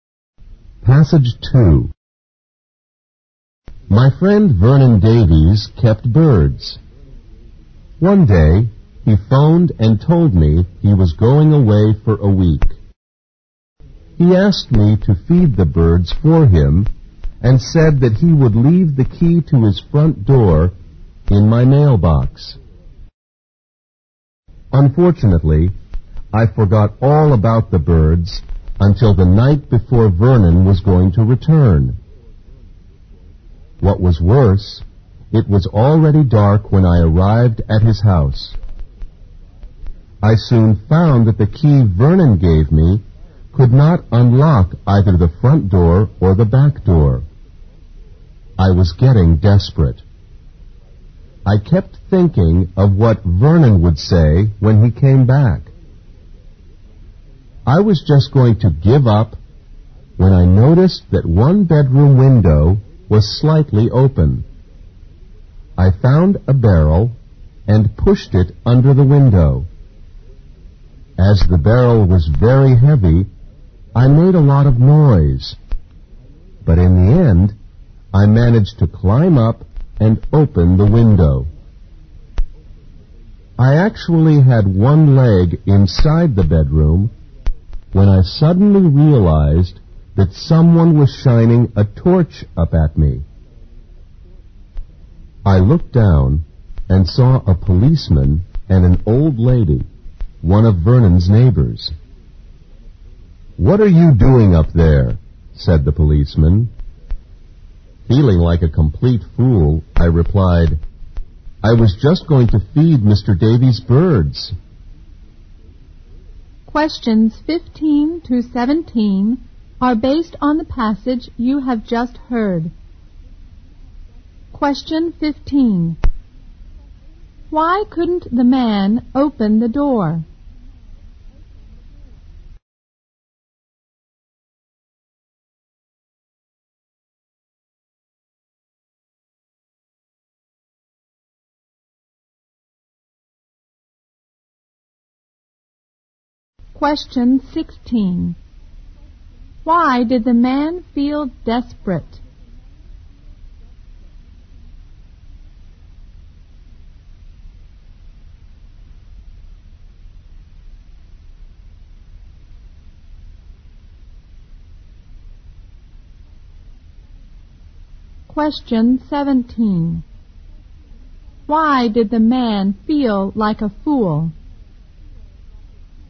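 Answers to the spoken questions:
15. Vernon had given him the wrong key
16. He worried what Vernon would say when he came back
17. He was caught climbing in through the window by a policeman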